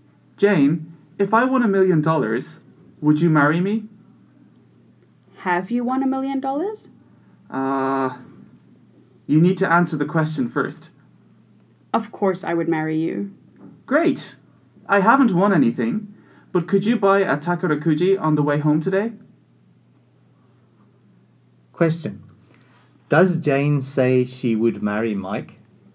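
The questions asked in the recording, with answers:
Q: Does Jane say she would marry Mike?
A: Yes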